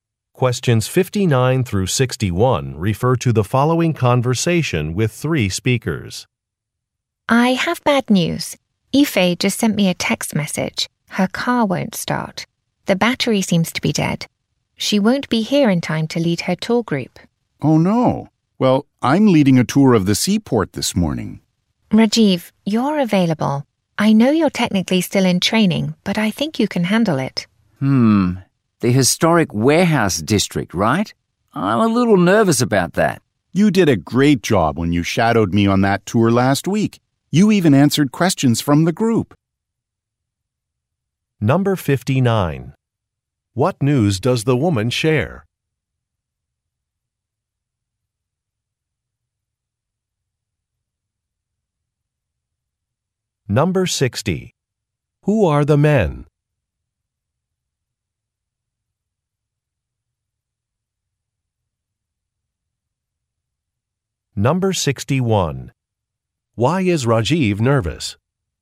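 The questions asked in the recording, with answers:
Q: What news does the woman share?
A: A coworker's car won't start

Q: Who are the men?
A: Tour guides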